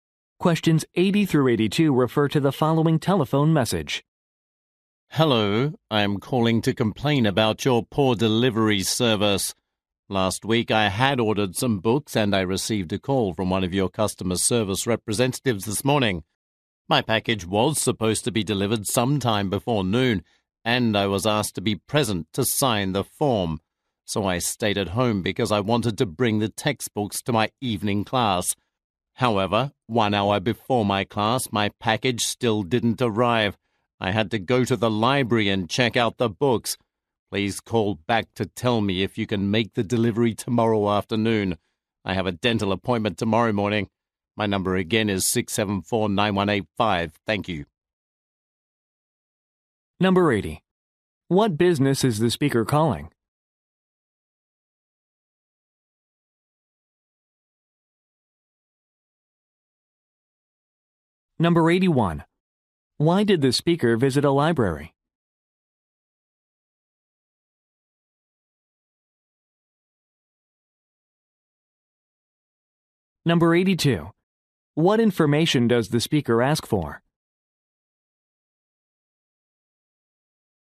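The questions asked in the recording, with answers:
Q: Why did the speaker visit a library?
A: To get the books she needed for class because her package didn't arrive

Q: What information does the speaker ask for?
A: Whether the delivery can be made tomorrow afternoon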